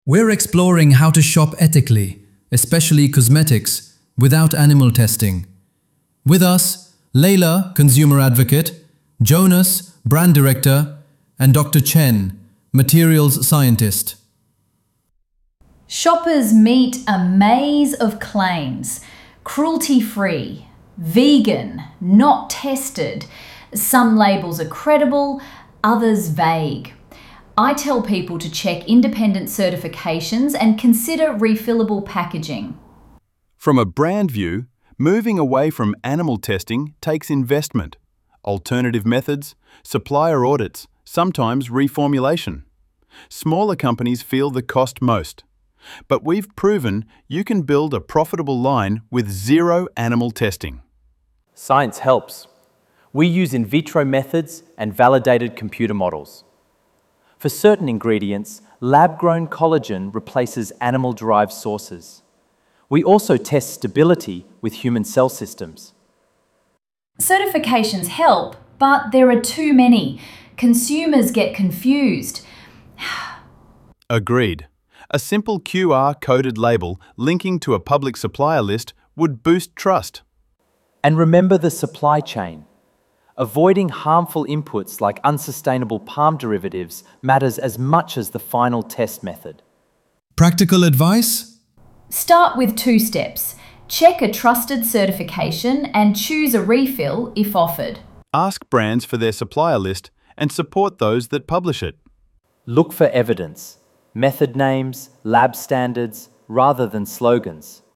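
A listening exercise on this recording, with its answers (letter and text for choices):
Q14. Smaller firms may struggle with the cost of change.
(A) Leila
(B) Jonas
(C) Dr. Chen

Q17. Dr. Chen mentions lab-grown as an alternative to animal-derived sources.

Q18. Jonas suggests a QR-coded to link to supplier transparency.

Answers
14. (B) Jonas
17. collagen
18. label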